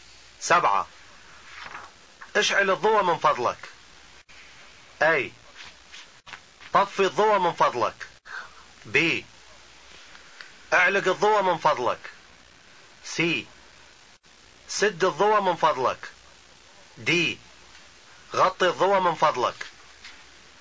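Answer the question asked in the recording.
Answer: B: اعلق الضوء من فضلك.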